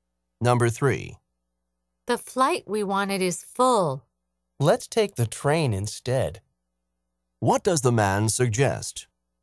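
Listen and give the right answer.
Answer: Taking the train instead.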